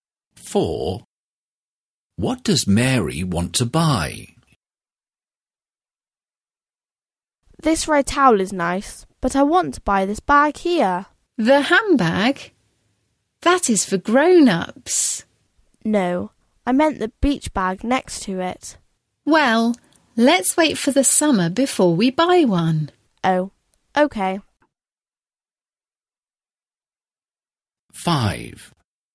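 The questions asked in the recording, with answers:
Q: What does Mary want to buy?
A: A beach bag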